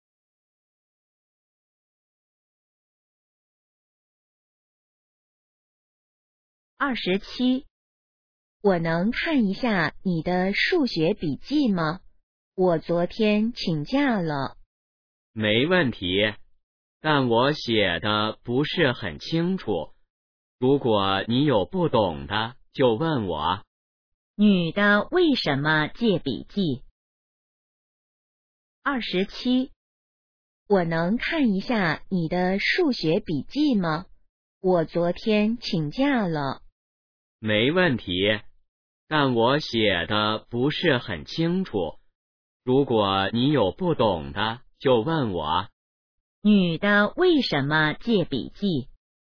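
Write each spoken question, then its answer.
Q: 女的为什么借笔记?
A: 她昨天请假了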